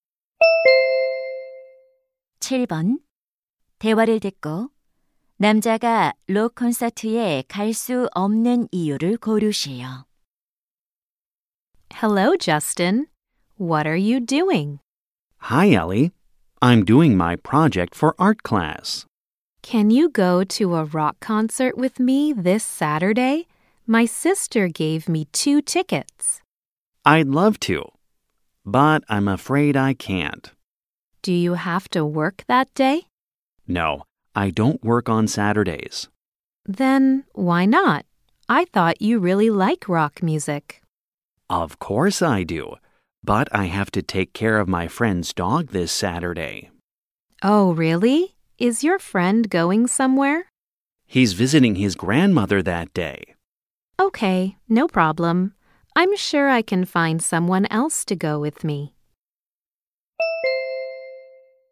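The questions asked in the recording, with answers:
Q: 대화를 듣고 남자가 록 콘서트에 갈 수 없는 이유를 고르시오.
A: 친구의 개를 돌봐야 해서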